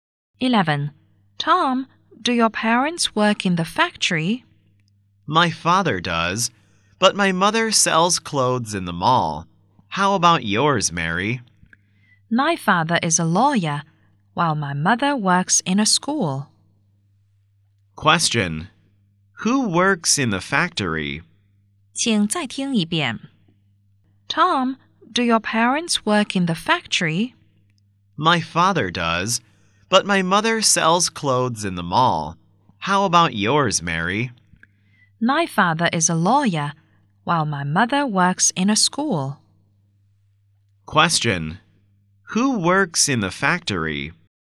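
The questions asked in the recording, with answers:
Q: Who works in the factory?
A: Tom's father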